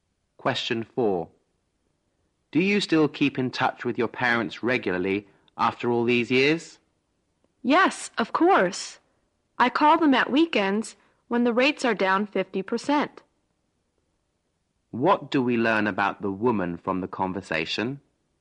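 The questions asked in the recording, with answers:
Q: What do we learn about the woman from the conversation?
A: She calls her parents at weekends, when the rates are 50% lower.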